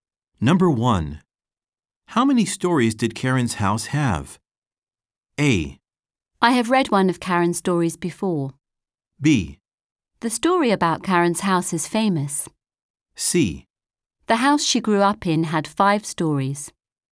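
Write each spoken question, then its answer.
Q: How many stories did Karen's house have?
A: C: The house she grew up in had 5 stories.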